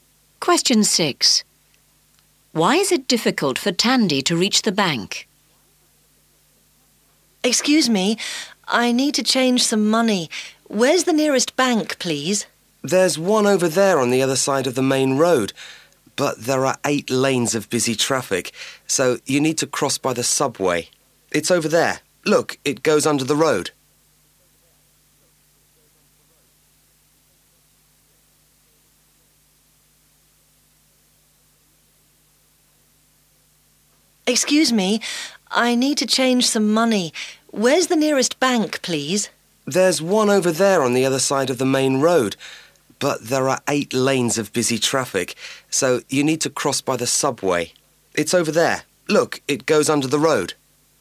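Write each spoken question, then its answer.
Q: Why is it difficult for Tandy to reach the bank?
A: There are 8 lanes of busy traffic, so she must use the subway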